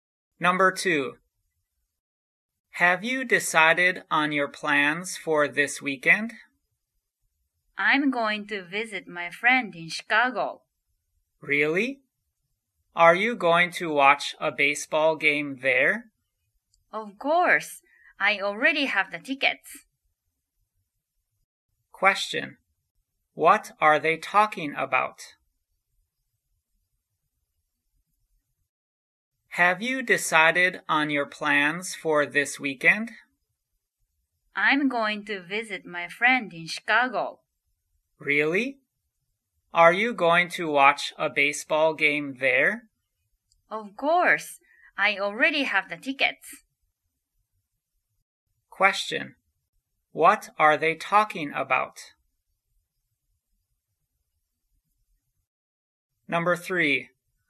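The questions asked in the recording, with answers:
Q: What are they talking about?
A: Plans for this weekend (visiting a friend in Chicago and watching a baseball game)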